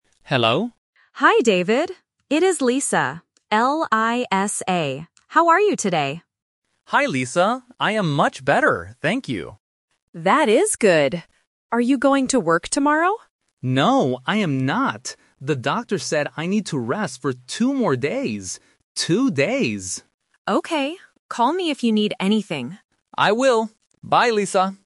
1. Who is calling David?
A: Lisa

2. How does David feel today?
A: He is much better.

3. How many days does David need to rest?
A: Two days

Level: A1